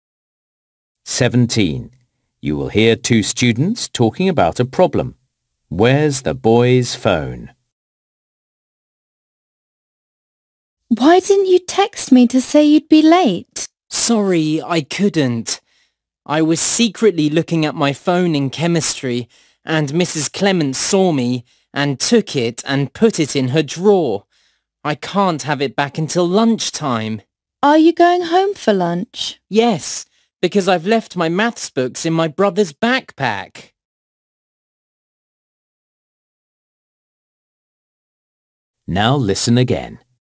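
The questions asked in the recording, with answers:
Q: Where's the boy's phone?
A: In Mrs. Clements' drawer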